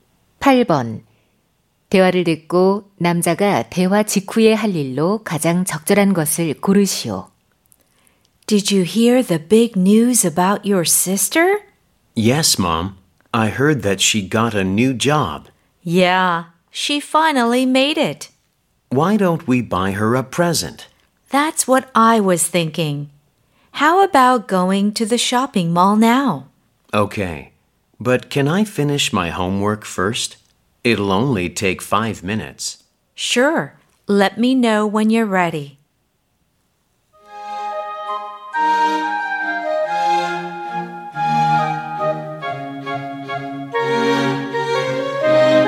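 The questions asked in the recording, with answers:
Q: 대화를 듣고 남자가 대화 직후에 할 일로 가장 적절한 것을 고르시오.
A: 숙제 끝내기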